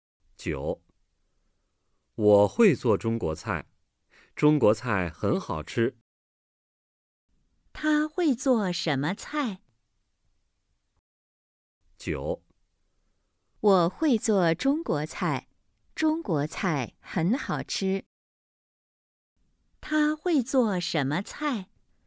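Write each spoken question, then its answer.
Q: 他会做什么菜?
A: 中国菜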